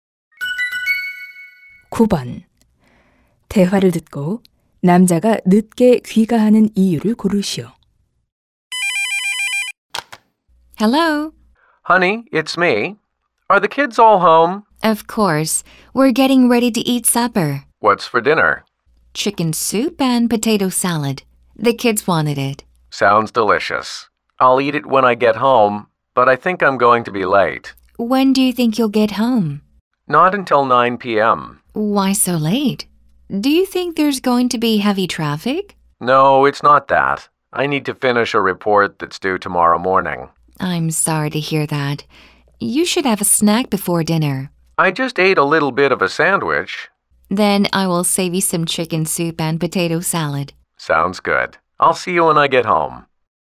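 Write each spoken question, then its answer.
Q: 대화를 듣고 남자가 늦게 귀가하는 이유를 고르시오.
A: 내일 아침까지 내야 하는 보고서를 끝내야 해서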